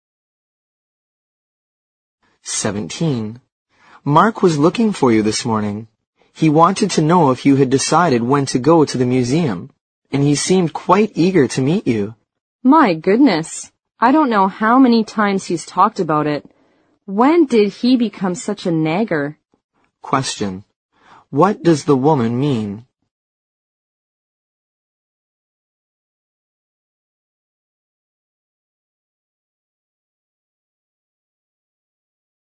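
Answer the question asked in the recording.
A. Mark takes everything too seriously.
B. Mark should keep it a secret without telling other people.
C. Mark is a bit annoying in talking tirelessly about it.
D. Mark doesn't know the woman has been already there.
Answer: C. Mark is a bit annoying in talking tirelessly about it.

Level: 六级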